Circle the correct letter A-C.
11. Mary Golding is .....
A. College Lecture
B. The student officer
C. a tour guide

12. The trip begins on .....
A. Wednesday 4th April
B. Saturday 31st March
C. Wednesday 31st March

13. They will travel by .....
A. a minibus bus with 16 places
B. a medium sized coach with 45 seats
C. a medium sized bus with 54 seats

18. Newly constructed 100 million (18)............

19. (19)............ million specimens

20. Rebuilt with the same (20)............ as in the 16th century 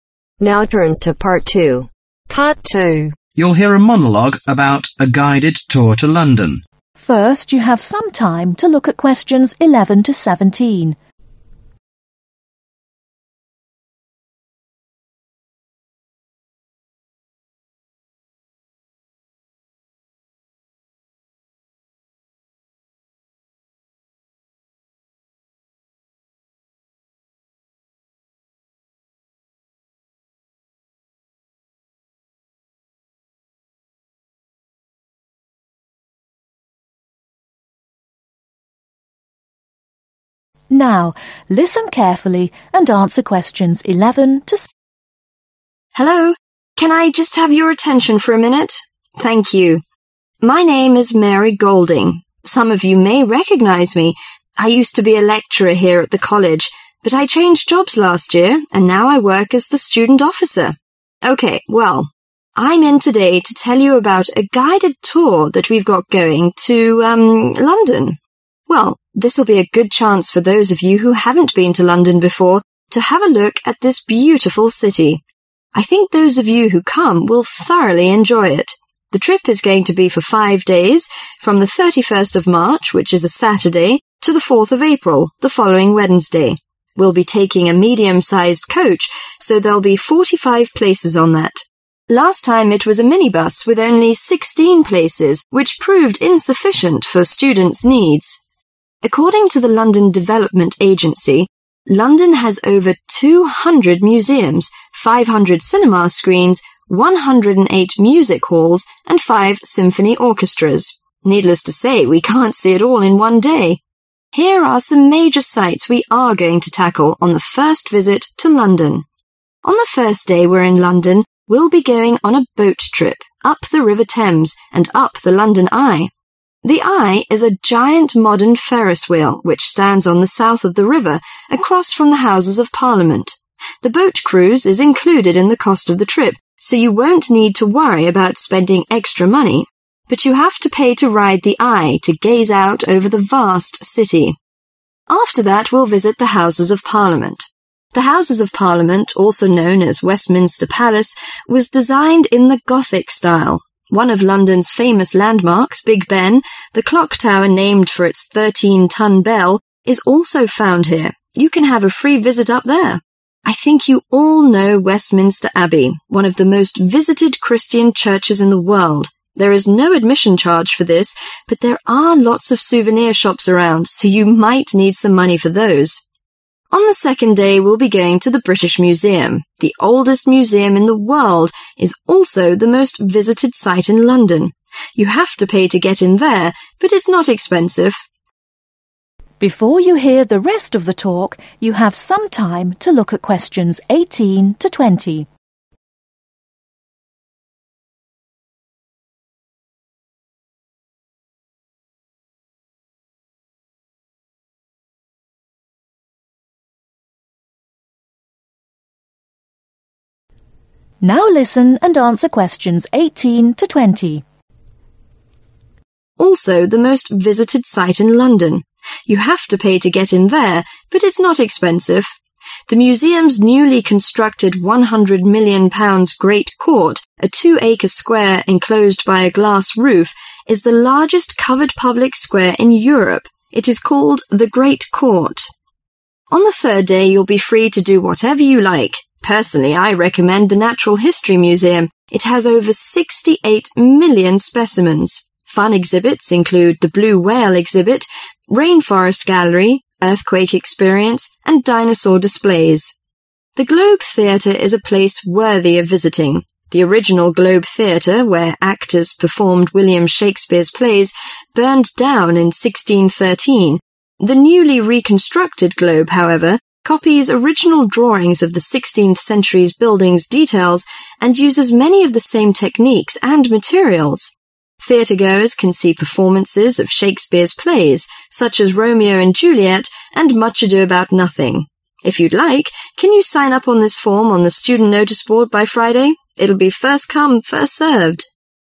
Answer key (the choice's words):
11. The student officer
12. Saturday 31st March
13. a medium sized coach with 45 seats
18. Great Court
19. 68
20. Technic